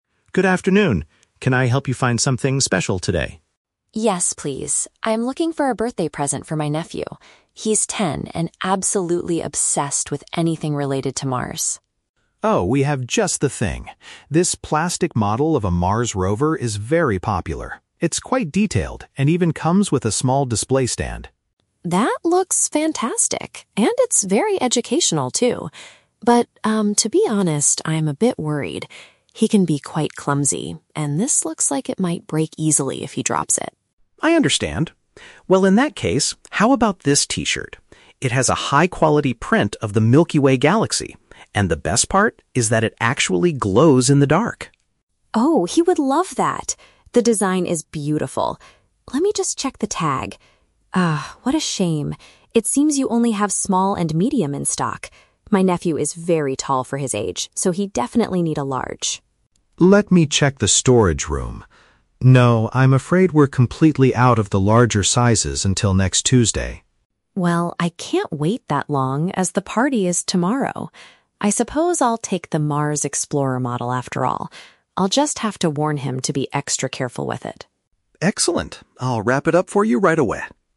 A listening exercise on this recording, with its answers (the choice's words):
Listen to the conversation in a gift shop and choose the correct answer (A, B, or C).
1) Why does the customer hesitate to buy the rover model at first?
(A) She thinks the price is too high for a plastic toy.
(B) She is concerned about the durability of the item.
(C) She believes it is too complicated for a ten-year-old.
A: She is concerned about the durability of the item.

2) What is the issue with the galaxy T-shirt?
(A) The glowing effect does not work properly.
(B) The shop does not have the correct size available.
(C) The design is not exactly what her nephew likes.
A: The shop does not have the correct size available.

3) What gift does the customer eventually purchase?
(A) A medium-sized T-shirt.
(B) A replica of a Mars vehicle.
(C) A book about the Milky Way.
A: A replica of a Mars vehicle.

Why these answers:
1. The customer mentions her nephew is "clumsy" and she is worried the plastic model "might break easily" (break easily = lack of durability). Option (A) and (C) are not mentioned.
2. The customer says her nephew needs a "large" size because he is tall, but the assistant confirms they are "completely out of the larger sizes." Option (A) is The Trap: The "glow in the dark" feature is mentioned as a positive thing, not a problem.
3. Since the T-shirt is out of stock in the right size, she says, "I'll take the Mars explorer model after all." (Mars explorer model = Mars rover / Mars vehicle). Option (A) is The Trap: She considers the T-shirt but rejects it because it's too small. Option (C) is not mentioned.

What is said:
Assistant: Good afternoon! Can I help you find something special today?
Customer: Yes, please. I'm looking for a birthday present for my nephew. He's ten and absolutely obsessed with anything related to Mars.
Assistant: Oh, we have just the thing! This plastic model of a Mars rover is very popular. It's quite detailed and even comes with a small display stand.
Customer: That looks fantastic, and it's very educational, too. But, um, to be honest, I'm a bit worried. He can be quite clumsy, and this looks like it might break easily if he drops it.
Assistant: I understand. Well, in that case, how about this T-shirt? It has a high-quality print of the Milky Way galaxy, and the best part is that it actually glows in the dark!
Customer: Oh, he would love that! The design is beautiful. Let me just check the tag... ah, what a shame. It seems you only have small and medium in stock. My nephew is very tall for his age, so he'd definitely need a large.
Assistant: Let me check the storage room... No, I'm afraid we're completely out of the larger sizes until next Tuesday.
Customer: Well, I can't wait that long as the party is tomorrow. I suppose I'll take the Mars explorer model after all. I'll just have to warn him to be extra careful with it!